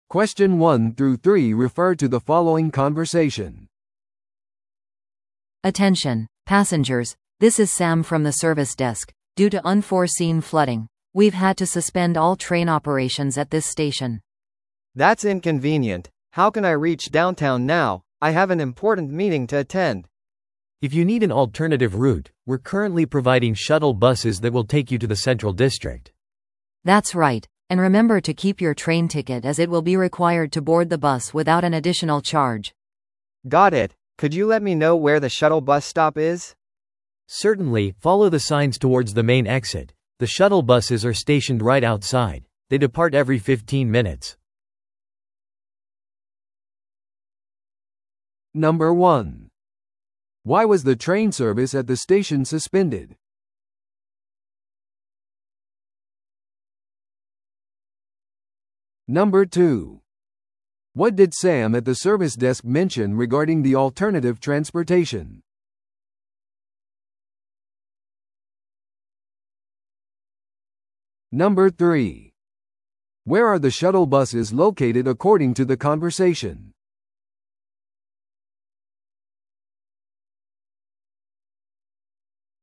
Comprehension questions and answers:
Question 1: Why was the train service at the station suspended?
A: 駅で洪水が発生しました。

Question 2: What did Sam at the service desk mention regarding the alternative transportation?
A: 列車のチケットがシャトルバスで有効です。

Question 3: Where are the shuttle buses located according to the conversation?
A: メイン出口の外。

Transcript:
This is Sam from the service desk. Due to unforeseen flooding, we've had to suspend all train operations at this station.
B: That's inconvenient. How can I reach downtown now? I have an important meeting to attend.
C: If you need an alternative route, we're currently providing shuttle buses that will take you to the central district.
A: That's right. And remember to keep your train ticket as it will be required to board the bus without an additional charge.
B: Got it. Could you let me know where the shuttle bus stop is?
C: Certainly, follow the signs towards the main exit, the shuttle buses are stationed right outside. They depart every 15 minutes.